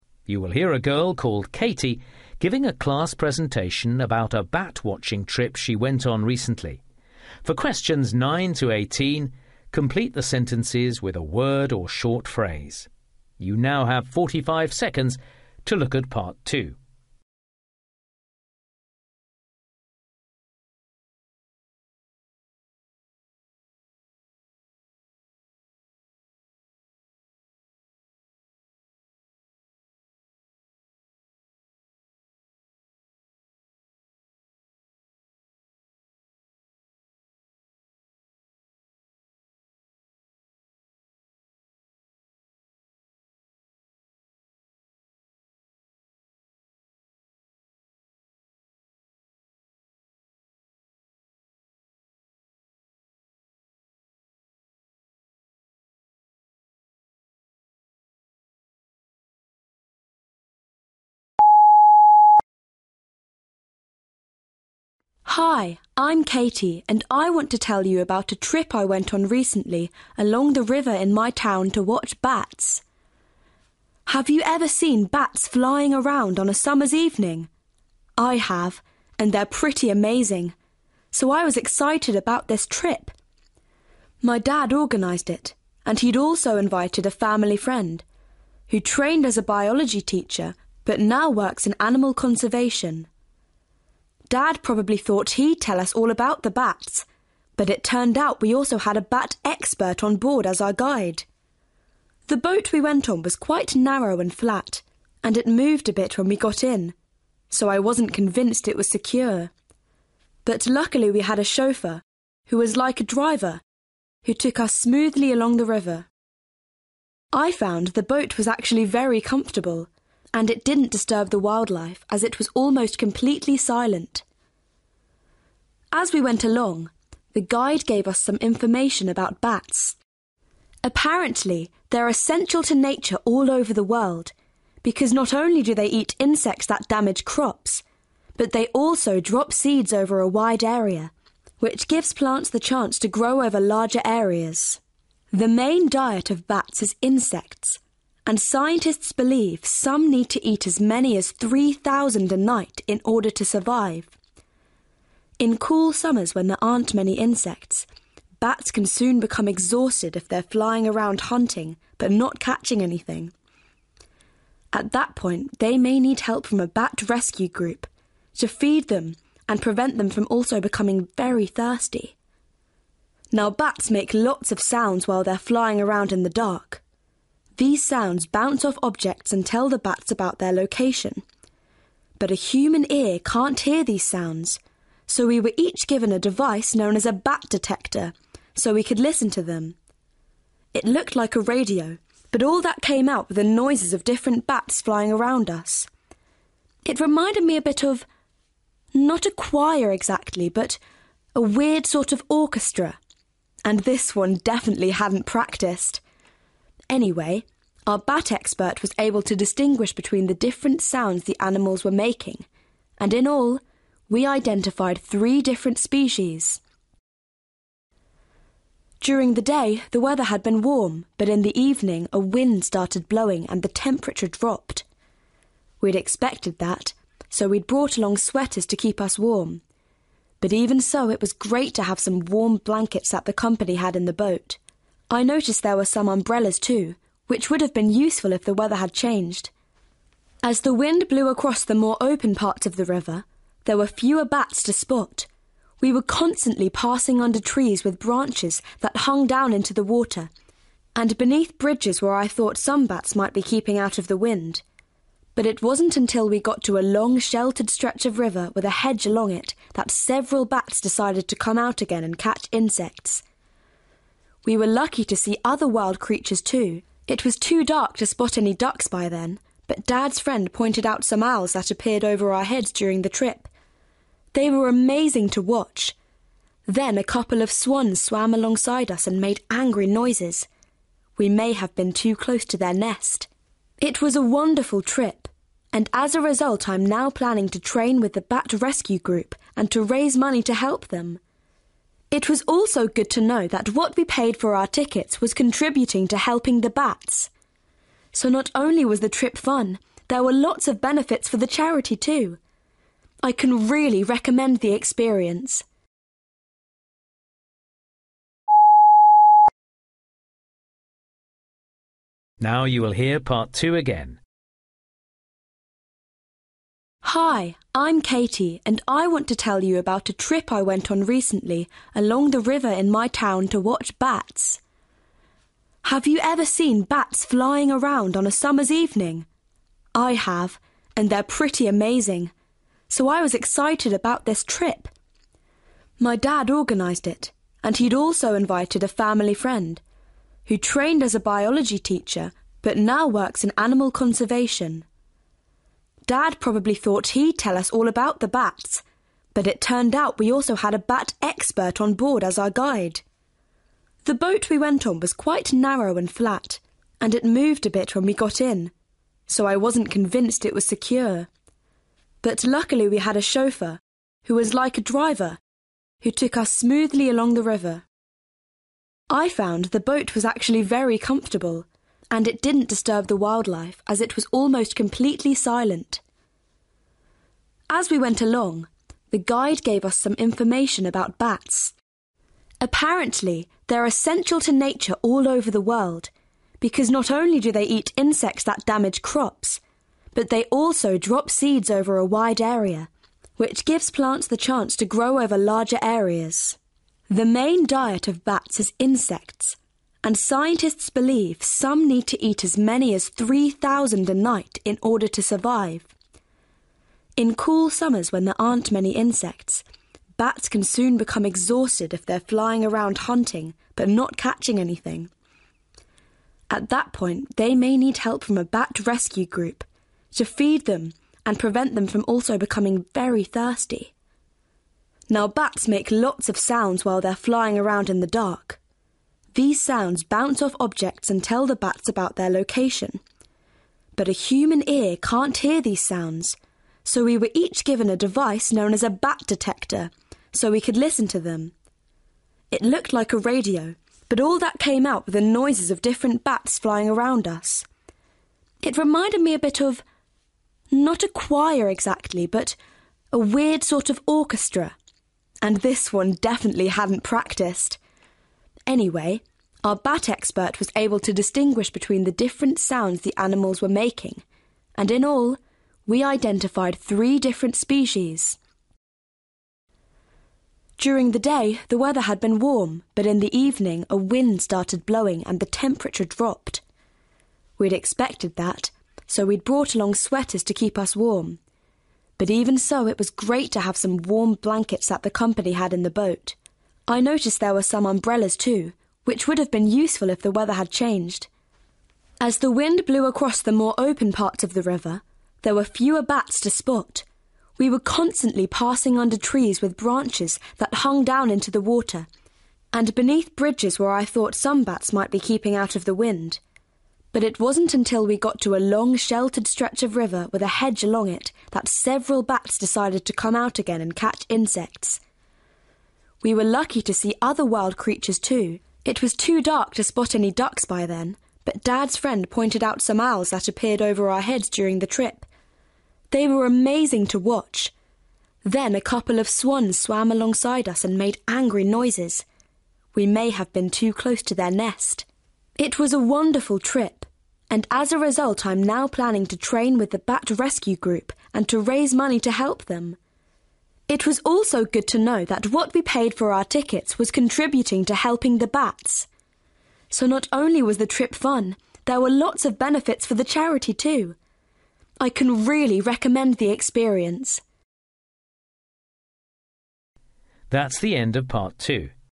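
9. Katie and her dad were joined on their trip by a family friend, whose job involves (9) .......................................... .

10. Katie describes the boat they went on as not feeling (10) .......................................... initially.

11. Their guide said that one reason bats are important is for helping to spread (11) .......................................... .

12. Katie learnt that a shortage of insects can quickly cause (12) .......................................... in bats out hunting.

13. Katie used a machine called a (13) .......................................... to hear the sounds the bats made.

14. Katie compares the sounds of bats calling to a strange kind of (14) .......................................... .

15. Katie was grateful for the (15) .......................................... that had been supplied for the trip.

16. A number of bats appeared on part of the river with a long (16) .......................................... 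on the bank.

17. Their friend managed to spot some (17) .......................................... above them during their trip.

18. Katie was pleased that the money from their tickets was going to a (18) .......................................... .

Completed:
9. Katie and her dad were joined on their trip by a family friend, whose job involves animal conservation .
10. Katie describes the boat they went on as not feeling secure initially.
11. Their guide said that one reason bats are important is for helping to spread seeds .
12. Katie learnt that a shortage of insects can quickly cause exhaustion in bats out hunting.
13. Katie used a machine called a bat detector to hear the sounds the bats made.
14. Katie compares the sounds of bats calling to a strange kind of orchestra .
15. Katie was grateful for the blankets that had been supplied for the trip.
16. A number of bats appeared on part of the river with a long hedge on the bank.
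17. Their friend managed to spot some owls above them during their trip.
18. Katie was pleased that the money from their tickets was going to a charity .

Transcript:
Hi! I'm Katie and I want to tell you about a trip I went on recently along the river in my town, to watch bats! Have you ever seen bats flying around on a summer's evening? I have – and they're pretty amazing, so I was excited about this trip! My dad organised it, and he'd also invited a family friend, who trained as a biology teacher but now works in animal conservation. Dad probably thought he'd tell us all about the bats, but it turned out we also had a bat expert on board as our guide!
The boat we went on was quite narrow and flat, and it moved a bit when we got in, so I wasn't convinced it was secure. But luckily we had a chauffeur, who was like a driver, who took us smoothly along the river. I found the boat was actually very comfortable. 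And it didn't disturb the wildlife, as it was almost completely silent.
As we went along, the guide gave us some information about bats. Apparently, they're essential to nature all over the world, because not only do they eat insects that damage crops, but they also drop seeds over a wide area, which gives plants the chance to grow over larger areas.
The main diet of bats is insects, and scientists believe some need to eat as many 3,000 a night in order to survive. In cool summers when there aren't many insects, bats can soon become exhausted if they're flying around hunting but not catching anything. At that point they may need help from a bat rescue group, to feed them and prevent them from also becoming very thirsty.
Now bats make lots of sounds while they're flying around in the dark. These sounds bounce off objects and tell the bats about their location. But a human ear can't hear these sounds, so we were each given a device known as a bat detector so we could listen to them! 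It looked like a radio, but all that came out were the noises of different bats flying around us. It reminded me a bit of, not a choir exactly, but a weird sort of orchestra! And this one definitely hadn't practised! Anyway, our bat expert was able to distinguish between the different sounds the animals were making, and in all, we identified three different species!
During the day, the weather had been warm, but in the evening, a wind started blowing, and the temperature dropped. We'd expected that, so we'd brought along sweaters to keep us warm, but even so it was great to have some warm blankets that the company had in the boat. I noticed there were some umbrellas, too, which would have been useful if the weather had changed.
As the wind blew across more the open parts of the river, there were fewer bats to spot. We were constantly passing under trees with branches that hung down into the water, and beneath bridges where I thought some bats might be keeping out of the wind. 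But it wasn't until we got to a long sheltered stretch of river with a hedge along it that several bats decided to come out again and catch insects.
We were lucky to see other wild creatures too. It was too dark to spot any ducks by then, but Dad's friend pointed out some owls that appeared over our heads during the trip. They were amazing to watch! Then a couple of swans swam alongside us and made angry noises – we may have been too close to their nest.
It was a wonderful trip, and as a result I'm now planning to train with the bat rescue group, and to raise money to help them. It was also good to know that what we paid for our tickets was contributing to helping the bats. So not only was the trip fun, there were lots of benefits for the charity too. I can really recommend the experience!

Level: FCE (B2)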